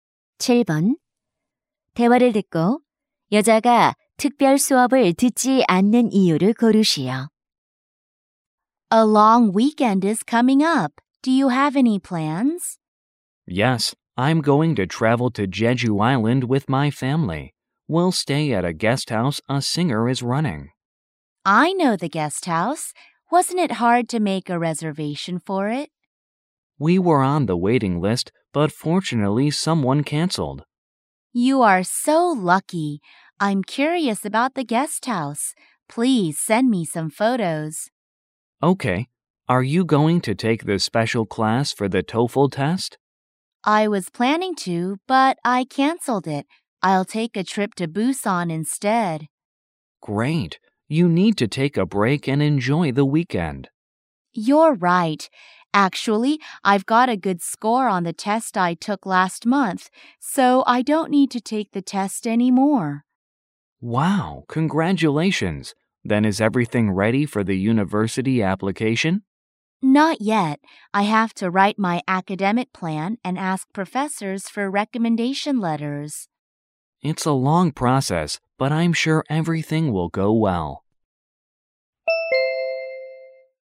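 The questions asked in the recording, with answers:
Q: 대화를 듣고 여자가 특별 수업을 듣지 않는 이유를 고르시오.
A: 이미 토플 시험에서 좋은 점수를 받아서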